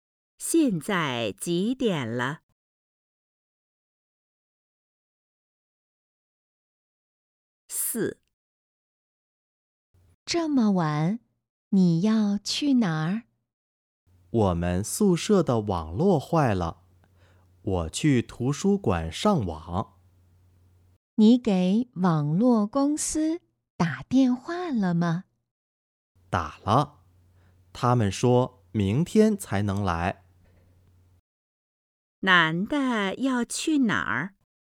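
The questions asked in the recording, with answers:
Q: 男的要去哪儿?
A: 图书馆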